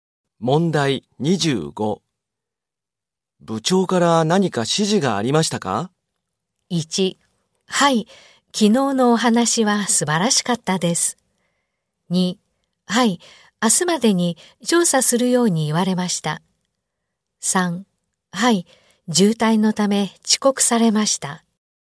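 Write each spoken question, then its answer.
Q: 部長から何か指示がありましたか?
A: 2: はい、明日までに調査するように言われました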